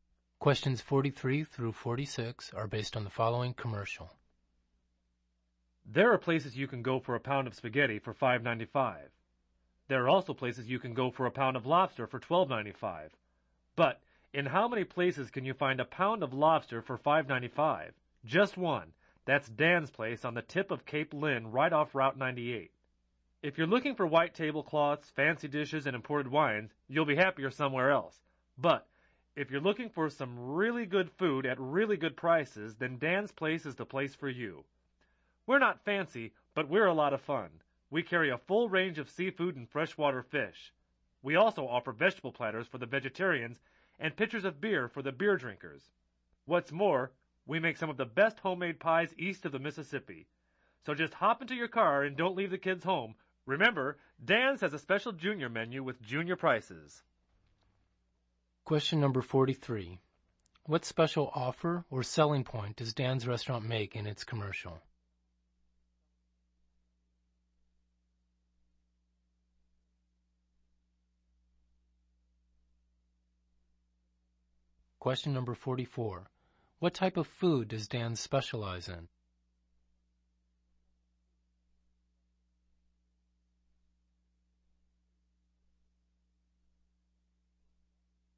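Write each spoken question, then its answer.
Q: What special offer or selling point does Dan's restaurant make in its commercial?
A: A pound of lobster for $5.95

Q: What type of food does Dan specialize in?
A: Seafood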